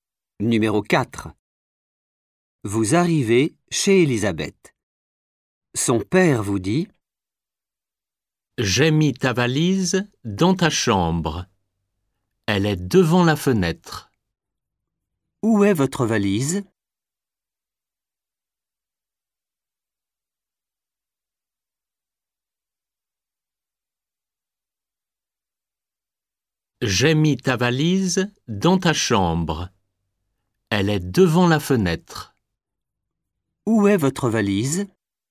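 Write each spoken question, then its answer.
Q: Où est votre valise ?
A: Dans la chambre, devant la fenêtre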